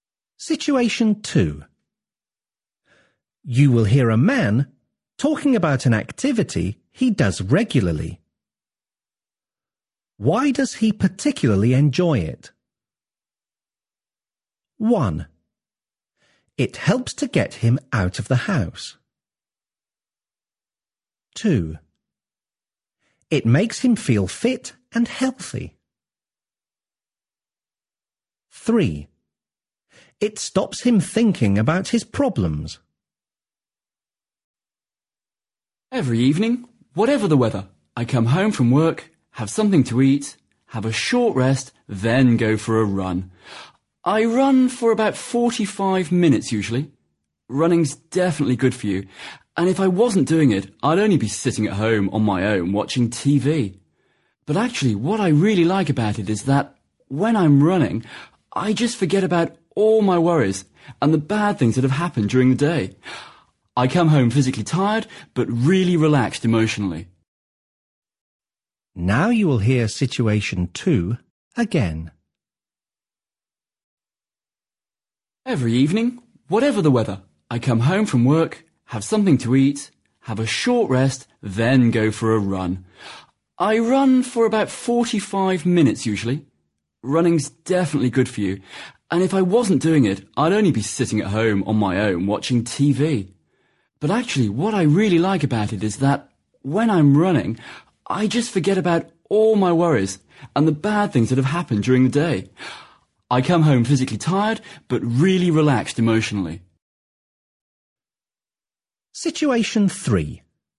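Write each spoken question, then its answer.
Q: Why does he particularly enjoy it?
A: 3: It stops him thinking about his problems.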